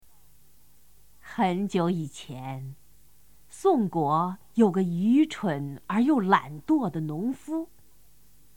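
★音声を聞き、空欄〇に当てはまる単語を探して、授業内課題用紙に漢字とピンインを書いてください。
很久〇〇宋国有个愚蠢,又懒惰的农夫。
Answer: 以前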